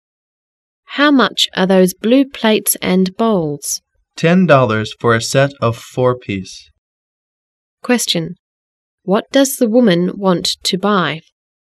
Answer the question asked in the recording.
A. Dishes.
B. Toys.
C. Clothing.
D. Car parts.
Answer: A. Dishes.

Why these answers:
W: How much are those blue plates and bowls? M: Ten dollars for a set of four-piece. Q: What does the woman want to buy?